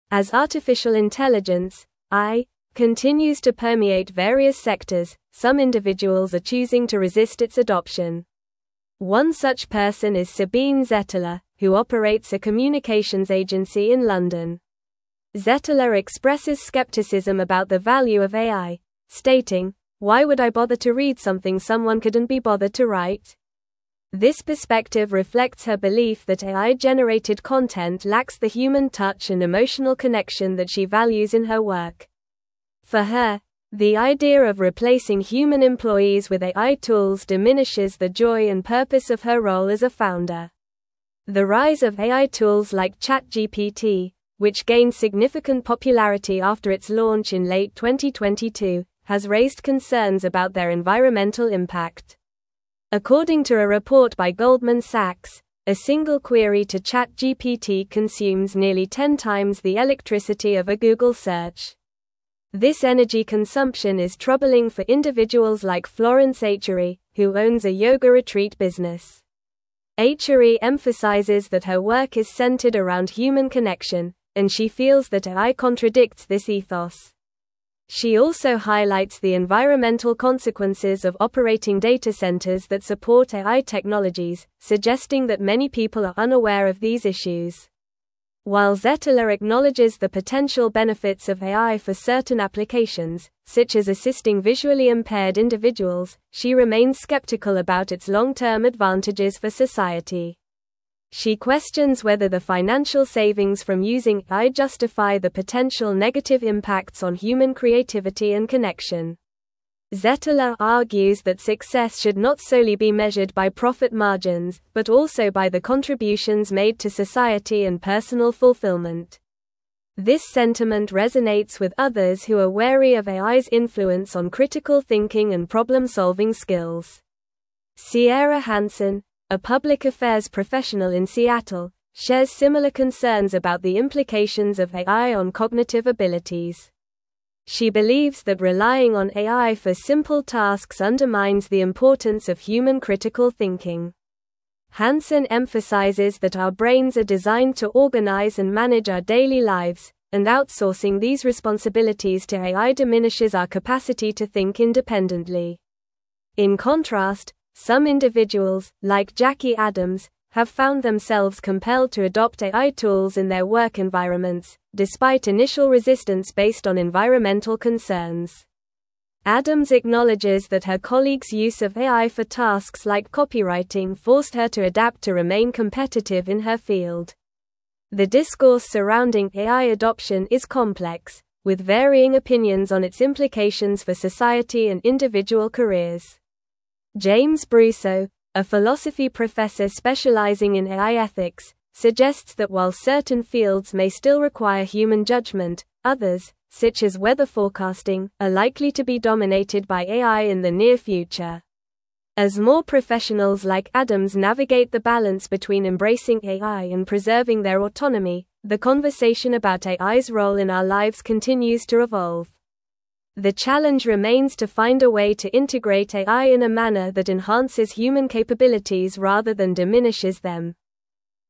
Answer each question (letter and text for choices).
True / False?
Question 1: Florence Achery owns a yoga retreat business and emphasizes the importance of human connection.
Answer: True

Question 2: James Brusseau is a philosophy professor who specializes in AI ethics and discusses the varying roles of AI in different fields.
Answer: True

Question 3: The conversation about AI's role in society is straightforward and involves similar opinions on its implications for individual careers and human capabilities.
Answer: False

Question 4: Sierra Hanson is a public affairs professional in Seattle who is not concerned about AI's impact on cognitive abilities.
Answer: False

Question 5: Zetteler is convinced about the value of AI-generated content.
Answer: False

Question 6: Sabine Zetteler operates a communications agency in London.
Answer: True

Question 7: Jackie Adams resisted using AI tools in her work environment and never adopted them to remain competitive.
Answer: False

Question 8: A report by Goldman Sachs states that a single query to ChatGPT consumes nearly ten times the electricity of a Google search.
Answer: True

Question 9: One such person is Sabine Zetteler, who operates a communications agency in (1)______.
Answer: London

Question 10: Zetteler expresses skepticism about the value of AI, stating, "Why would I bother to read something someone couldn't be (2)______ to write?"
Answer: bothered

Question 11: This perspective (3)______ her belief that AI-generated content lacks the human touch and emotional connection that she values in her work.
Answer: reflects

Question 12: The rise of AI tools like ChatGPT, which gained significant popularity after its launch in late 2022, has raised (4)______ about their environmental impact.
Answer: concerns

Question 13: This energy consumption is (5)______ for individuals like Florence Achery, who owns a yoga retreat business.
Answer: troubling

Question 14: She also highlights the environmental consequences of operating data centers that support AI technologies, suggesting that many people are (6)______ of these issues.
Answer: unaware

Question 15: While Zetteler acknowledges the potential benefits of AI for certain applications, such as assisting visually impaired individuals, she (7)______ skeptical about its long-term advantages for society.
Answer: remains

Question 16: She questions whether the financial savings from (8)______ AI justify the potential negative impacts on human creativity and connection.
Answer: using

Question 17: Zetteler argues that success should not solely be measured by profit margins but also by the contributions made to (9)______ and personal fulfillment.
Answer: society

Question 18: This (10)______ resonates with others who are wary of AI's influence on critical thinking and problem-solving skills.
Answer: sentiment

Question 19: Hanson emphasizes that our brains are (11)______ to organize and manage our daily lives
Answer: designed

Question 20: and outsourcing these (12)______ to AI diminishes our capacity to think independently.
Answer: responsibilities

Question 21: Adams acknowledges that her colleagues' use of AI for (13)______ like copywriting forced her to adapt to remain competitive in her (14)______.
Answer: tasks

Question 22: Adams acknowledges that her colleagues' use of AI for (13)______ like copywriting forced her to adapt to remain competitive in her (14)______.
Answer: field

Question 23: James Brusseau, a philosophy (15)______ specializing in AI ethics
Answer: professor

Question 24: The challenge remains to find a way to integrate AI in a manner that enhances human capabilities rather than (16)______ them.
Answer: diminishes

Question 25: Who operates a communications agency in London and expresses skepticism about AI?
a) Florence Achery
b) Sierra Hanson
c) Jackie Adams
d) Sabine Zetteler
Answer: d) Sabine Zetteler

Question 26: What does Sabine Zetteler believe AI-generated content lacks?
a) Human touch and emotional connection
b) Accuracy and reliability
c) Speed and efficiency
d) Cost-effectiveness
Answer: a) Human touch and emotional connection

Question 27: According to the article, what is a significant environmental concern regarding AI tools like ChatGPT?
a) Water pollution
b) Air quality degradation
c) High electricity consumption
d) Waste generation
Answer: c) High electricity consumption

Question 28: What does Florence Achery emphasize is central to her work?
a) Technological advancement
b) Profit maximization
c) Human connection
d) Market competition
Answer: c) Human connection

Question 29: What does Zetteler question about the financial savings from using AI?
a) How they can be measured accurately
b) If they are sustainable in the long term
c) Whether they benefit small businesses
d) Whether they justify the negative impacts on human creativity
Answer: d) Whether they justify the negative impacts on human creativity

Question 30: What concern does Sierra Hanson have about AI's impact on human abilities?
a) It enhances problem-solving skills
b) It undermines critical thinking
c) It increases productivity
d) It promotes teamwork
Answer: b) It undermines critical thinking

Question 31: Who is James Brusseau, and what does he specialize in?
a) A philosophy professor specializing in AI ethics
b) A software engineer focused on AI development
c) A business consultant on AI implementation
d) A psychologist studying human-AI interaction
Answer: a) A philosophy professor specializing in AI ethics

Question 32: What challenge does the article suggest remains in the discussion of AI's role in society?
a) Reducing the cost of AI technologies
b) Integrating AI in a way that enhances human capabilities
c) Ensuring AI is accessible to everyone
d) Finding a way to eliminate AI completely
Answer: b) Integrating AI in a way that enhances human capabilities

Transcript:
As artificial intelligence (AI) continues to permeate various sectors, some individuals are choosing to resist its adoption. One such person is Sabine Zetteler, who operates a communications agency in London. Zetteler expresses skepticism about the value of AI, stating, "Why would I bother to read something someone couldn't be bothered to write?" This perspective reflects her belief that AI-generated content lacks the human touch and emotional connection that she values in her work. For her, the idea of replacing human employees with AI tools diminishes the joy and purpose of her role as a founder.
The rise of AI tools like ChatGPT, which gained significant popularity after its launch in late 2022, has raised concerns about their environmental impact. According to a report by Goldman Sachs, a single query to ChatGPT consumes nearly ten times the electricity of a Google search. This energy consumption is troubling for individuals like Florence Achery, who owns a yoga retreat business. Achery emphasizes that her work is centered around human connection, and she feels that AI contradicts this ethos. She also highlights the environmental consequences of operating data centers that support AI technologies, suggesting that many people are unaware of these issues.
While Zetteler acknowledges the potential benefits of AI for certain applications, such as assisting visually impaired individuals, she remains skeptical about its long-term advantages for society. She questions whether the financial savings from using AI justify the potential negative impacts on human creativity and connection. Zetteler argues that success should not solely be measured by profit margins but also by the contributions made to society and personal fulfillment. This sentiment resonates with others who are wary of AI's influence on critical thinking and problem-solving skills.
Sierra Hanson, a public affairs professional in Seattle, shares similar concerns about the implications of AI on cognitive abilities. She believes that relying on AI for simple tasks undermines the importance of human critical thinking. Hanson emphasizes that our brains are designed to organize and manage our daily lives, and outsourcing these responsibilities to AI diminishes our capacity to think independently. In contrast, some individuals, like Jackie Adams, have found themselves compelled to adopt AI tools in their work environments, despite initial resistance based on environmental concerns. Adams acknowledges that her colleagues' use of AI for tasks like copywriting forced her to adapt to remain competitive in her field.
The discourse surrounding AI adoption is complex, with varying opinions on its implications for society and individual careers. James Brusseau, a philosophy professor specializing in AI ethics, suggests that while certain fields may still require human judgment, others, such as weather forecasting, are likely to be dominated by AI in the near future. As more professionals like Adams navigate the balance between embracing AI and preserving their autonomy, the conversation about AI's role in our lives continues to evolve. The challenge remains to find a way to integrate AI in a manner that enhances human capabilities rather than diminishes them.